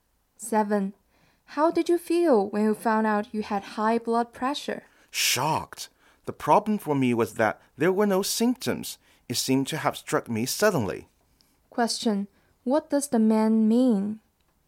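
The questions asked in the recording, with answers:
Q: What does the man mean?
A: He didn't expect it because there were no symptoms.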